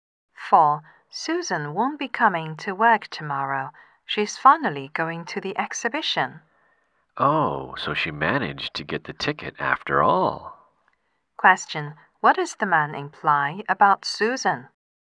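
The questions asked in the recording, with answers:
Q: What does the man imply about Susan?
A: She managed to get a ticket for the exhibition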